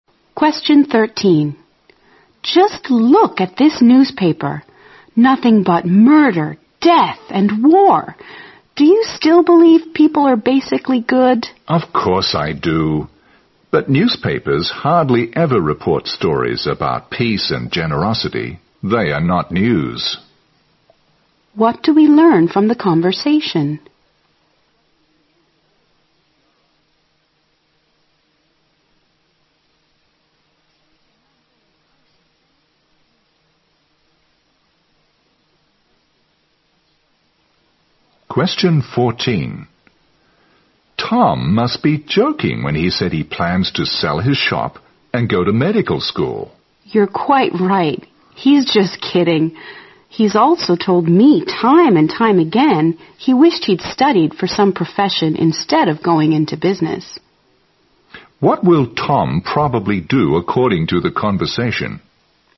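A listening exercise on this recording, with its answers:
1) What do we learn from the conversation?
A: The man is quite optimistic about human nature.

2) What will Tom probably do according to the conversation?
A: Stay in business.

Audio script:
W: Just look at this newspaper, nothing but murder, death and war! Do you still believe people are basically good?
M: Of course I do. But newspapers hardly ever report stories about peace and generosity. They are not news.
Q: What do we learn from the conversation?
M: Tom must be joking when he said he plans to sell his shop and go to medical school.
W: You are quite right. He is just kidding. He's also told me time and time again he wished he'd studied for some profession instead of going into business.
Q: What will Tom probably do according to the conversation?

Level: 六级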